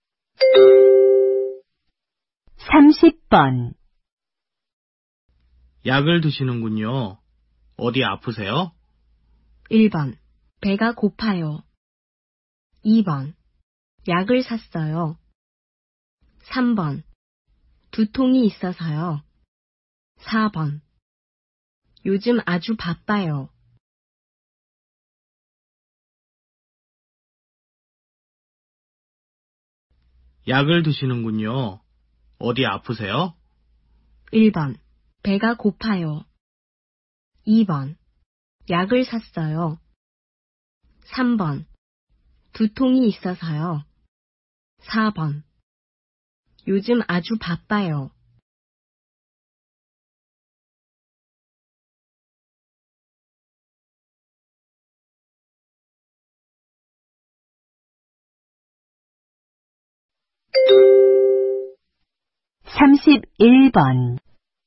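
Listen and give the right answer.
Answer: 3: 두통이 있어서요.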